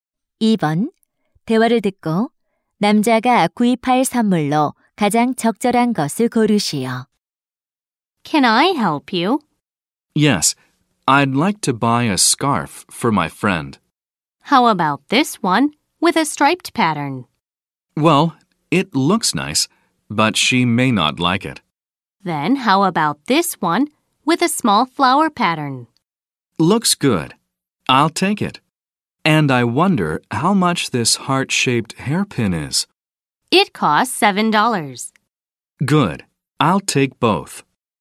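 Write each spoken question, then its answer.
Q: 대화를 듣고 남자가 구입할 선물로 가장 적절한 것을 고르시오.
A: 작은 꽃무늬 스카프와 하트 모양 머리핀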